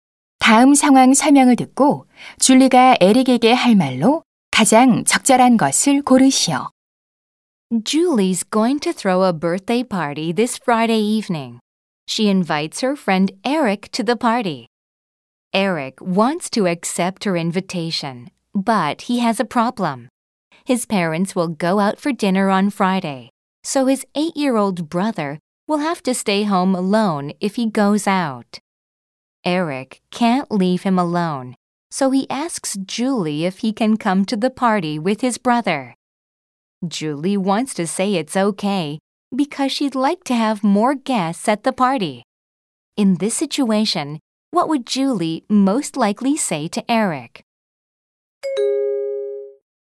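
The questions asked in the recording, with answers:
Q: In this situation, what would Julie most likely say to Eric?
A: Sure, you can bring your brother to the party.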